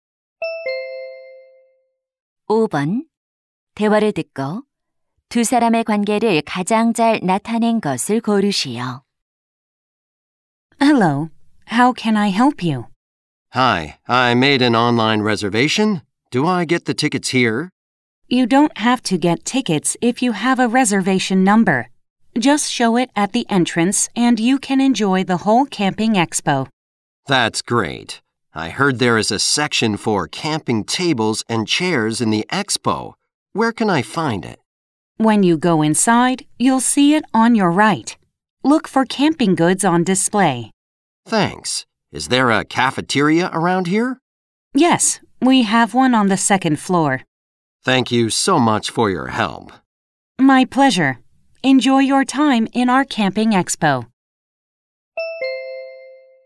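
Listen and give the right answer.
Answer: 캠핑 박람회 직원 - 관람객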